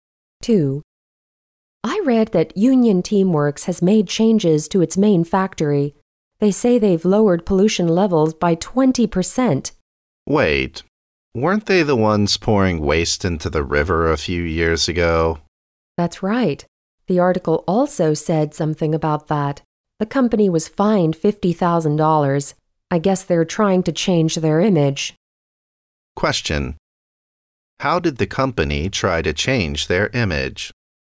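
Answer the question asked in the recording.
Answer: By lowering pollution levels at its main factory by 20%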